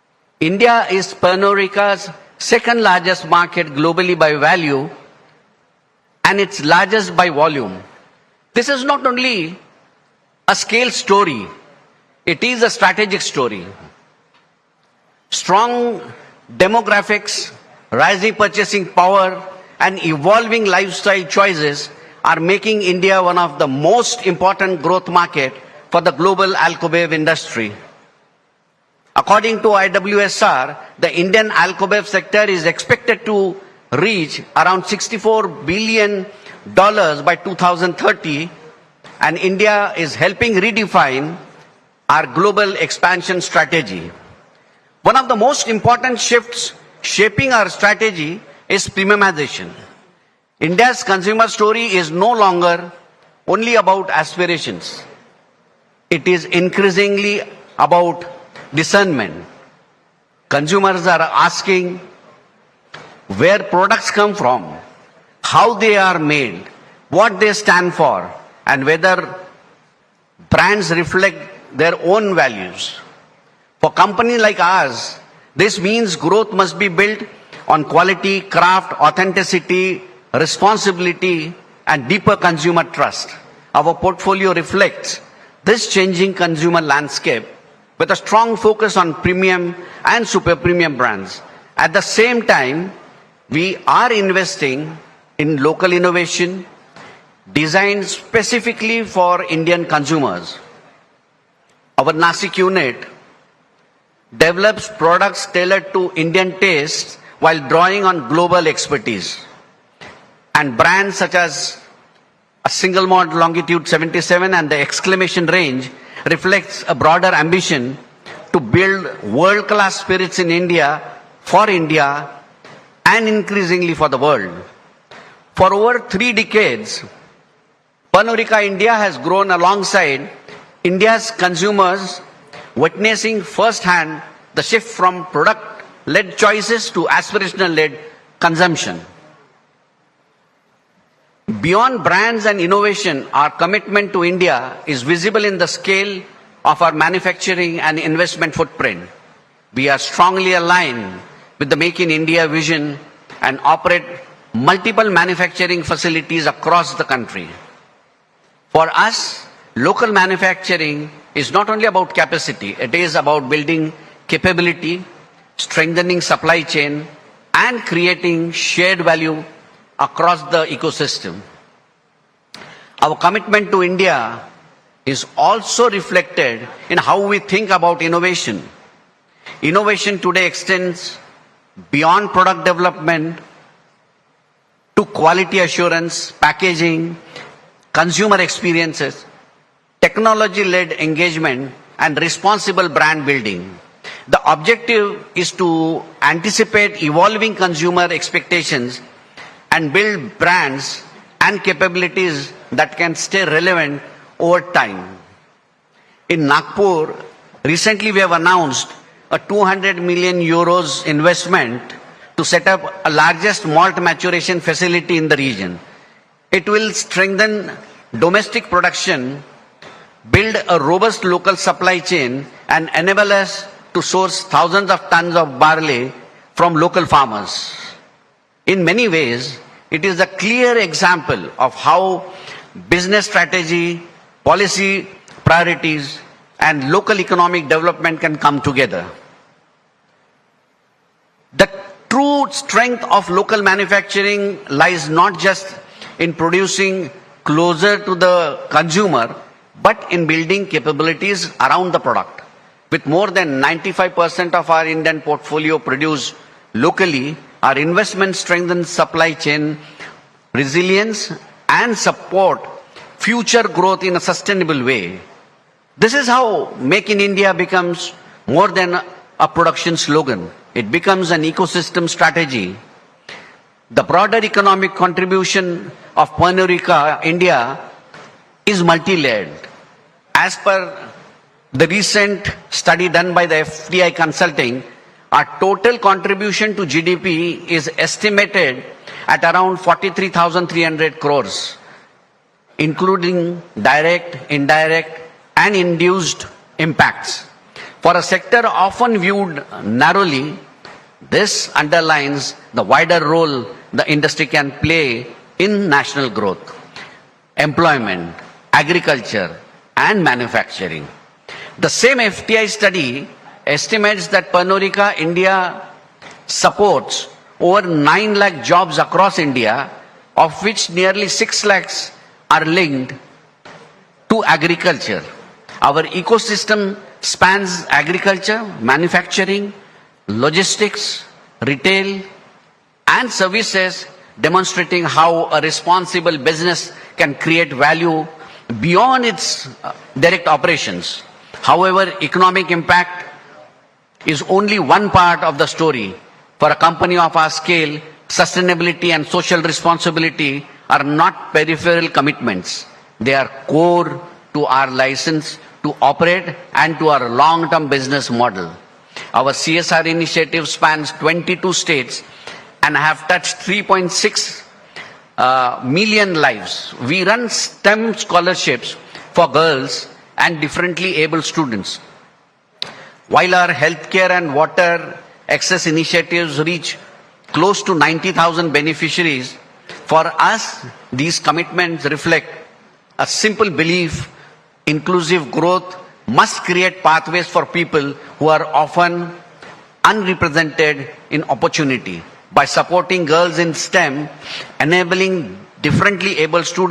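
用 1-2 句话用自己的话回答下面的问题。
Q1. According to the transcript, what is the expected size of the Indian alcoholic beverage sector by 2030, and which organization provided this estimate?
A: Around 64 billion dollars, according to IWSR.

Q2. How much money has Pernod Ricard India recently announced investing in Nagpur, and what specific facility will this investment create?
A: 200 million euros, to set up the largest malt maturation facility in the region.

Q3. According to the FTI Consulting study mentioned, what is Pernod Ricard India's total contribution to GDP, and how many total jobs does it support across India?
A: Around 43,300 crores; over 9 lakh jobs.

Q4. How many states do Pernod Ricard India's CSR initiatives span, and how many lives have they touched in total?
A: 22 states; 3.6 million lives.

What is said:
and responsible business practices.
We are here to build enduring capabilities, resilient supply chains, Indian talent, partnerships
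and community linkages that remain aligned with the priorities of the country we operate
in.
Today, India is Pernarika's second largest market globally by value and its largest
by volume.
This is not only a scale story, it is a strategic story.
Strong demographics, rising purchasing power and evolving lifestyle choices are making
India one of the most important growth market for the global Alkabev industry.
According to IWSR, the Indian Alkabev sector is expected to reach around 64 billion
dollars by 2030 and India is helping redefine our global expansion strategy.
One of the most important shifts shaping our strategy is prememoration.
India's consumer story is no longer only about aspirations.
It is increasingly about discernment.
Businesses are asking where products come from, how they are made, what they stand for
and whether brands reflect their own values.
For companies like ours, this means growth must be built on quality, craft, authenticity,
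responsibility and deeper consumer trust.
Our portfolio reflects this changing consumer landscape with a strong focus on premium
and super premium brands.
At the same time, we are investing in local innovation designed specifically for Indian
consumers.
Our Nasik unit develops products tailored to Indian taste while drawing on global expertise.
And brands such as a single model longitude 77 and the exclamation range reflects a
Nasiq unit Our Nasiq unit develops products tailored to Indian taste while drawing on global expertise and brands such as a single model longitude 77 and the exclamation range reflects a broader ambition to build worldclass spirits in India for India and increasingly for the world. For over three decades, three decades, Panorika India has grown alongside India's consumers, witnessing firsthand the shift from productled choices to aspirationalled consumption. Beyond brands and innovation, our commitment to India is visible in the scale of our manufacturing and investment footprint. 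We are
strongly aligned with the make in India vision and operate multiple manufacturing facilities across the country. For us, local manufacturing is not only about capacity. It is about building capability, strengthening supply chain and creating shared value across the ecosystem. ecosystem. Our commitment to India is also reflected in how we think about innovation. innovation. Innovation today extends beyond product development development to quality assurance, packaging, consumer experiences, consumer experiences, technology-led engagement and technology-led engagement and responsible brand building. The objective is to anticipate evolving consumer expectations and build brands
and capabilities that can stay relevant over time. over time. in Nagpur. Recently, we have announced a €200 million investment to set up a largest malt maturation facility in the region. It will strengthen domestic production, production, build a robust local supply chain and enable us to source thousands of tons of barley from local farmers. 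In many ways, it is a clear example of how business strategy, policy priorities, and local economic development can come together. The true strength of local manufacturing lies not just in producing closer to
the consumer, but in building capabilities around the product. With more than 95% of our Indian portfolio produced locally, our investment strengthens supply chain resilience and support future growth in a sustainable way.
With more than 95% of our Indian portfolio produce locally, our investment strengthen supply chain resilience and support future growth in a sustainable way.
This is how make in India becomes more than a production slogan, it becomes an ecosystem strategy, the broader economic contribution of Punarica India is multi layered as per the recent study done by the FDI Consulting.
Our total contribution to GDP is estimated at around 43,300 crores, including direct, indirect and induced impacts.
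For a sector often viewed narrowly, this underlines the wider role the industry can play in national growth, employment, agriculture and manufacturing.
The same FTI study estimates that Panorica, India supports over 9 lakh jobs across India, of which nearly 6 lakhs are linked to agriculture.
Our ecosystem spans agriculture, manufacturing, logistics, retail and services, demonstrating how a responsible business can create value beyond its direct operations.
However, economic impact is only one part of the story.
For a company of our scale, sustainability and social responsibility are not peripheral commitments.
They are core to our license to operate and to our long term business model.
Our CSR initiative spans 22 states and have touched 3.6 million lives.
We run stem scholarships for girls and differently able students, while our health care and water access initiatives reach close to 90,000 beneficiaries.
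For us, these commitments reflect a simple belief, inclusive growth must create pathways for people who are often unrepresented in opportunity by supporting girls in stem, enabling differently able student.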